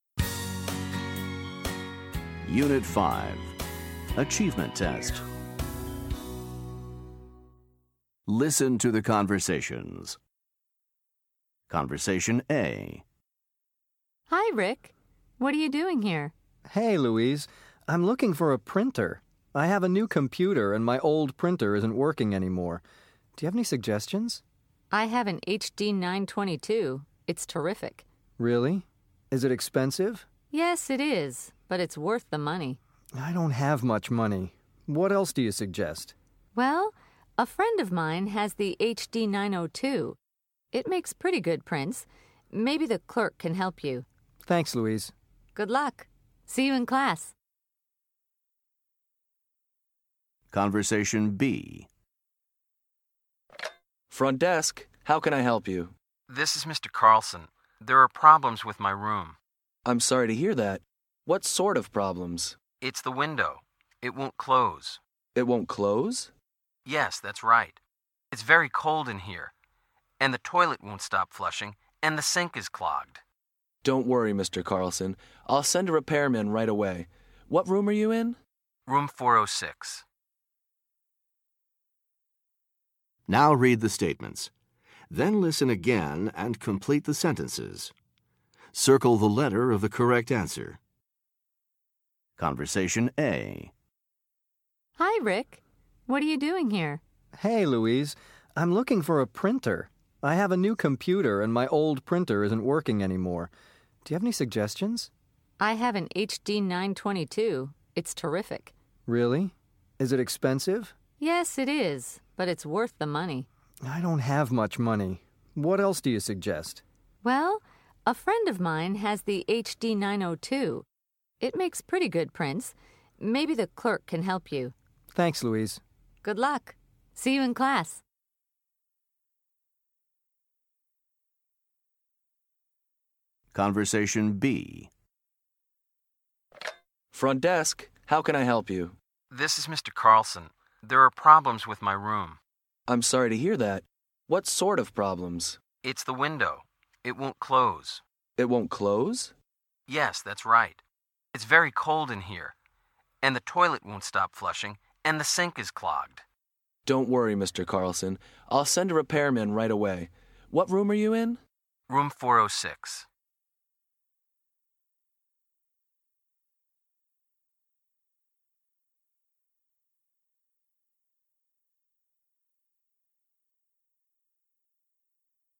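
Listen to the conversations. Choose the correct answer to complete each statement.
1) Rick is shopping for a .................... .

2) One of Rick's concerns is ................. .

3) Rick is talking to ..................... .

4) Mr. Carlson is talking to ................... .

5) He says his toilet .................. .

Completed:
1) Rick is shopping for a printer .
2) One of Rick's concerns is the price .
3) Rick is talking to a classmate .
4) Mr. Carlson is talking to the front desk clerk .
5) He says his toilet won't stop flushing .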